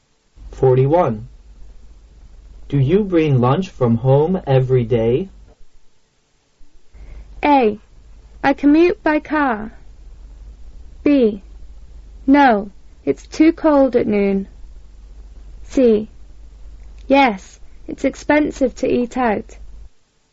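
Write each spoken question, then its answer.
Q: Do you bring lunch from home every day?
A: C: Yes, it's expensive to eat out.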